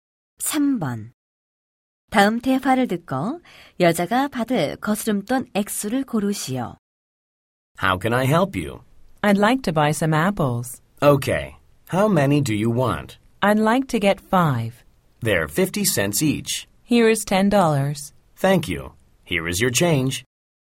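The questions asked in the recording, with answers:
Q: 다음 대화를 듣고 여자가 받을 거스름돈 액수를 고르시오.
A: 7달러 50센트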